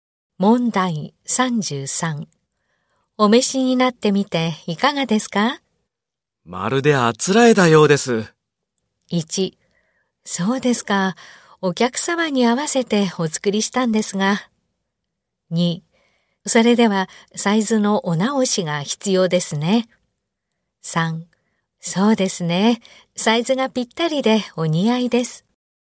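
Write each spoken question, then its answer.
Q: お召しになってみていかがですか?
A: 3: そうですね。サイズがぴったりでお似合いです。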